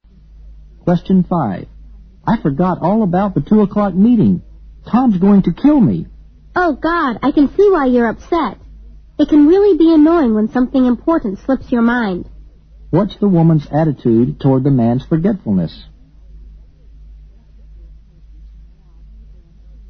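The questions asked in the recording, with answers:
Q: What's the woman's attitude toward the man's forgetfulness?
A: She is sympathetic and understands why he is upset.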